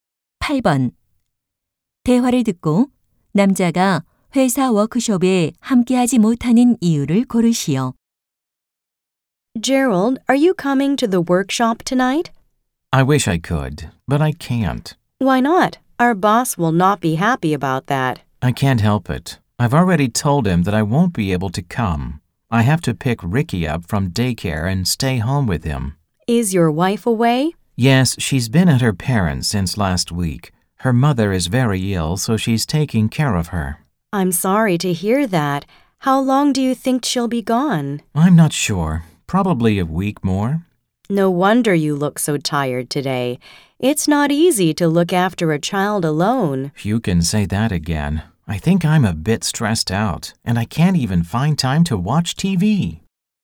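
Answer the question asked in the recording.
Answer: 아이를 어린이집에서 데려와 돌봐야 해서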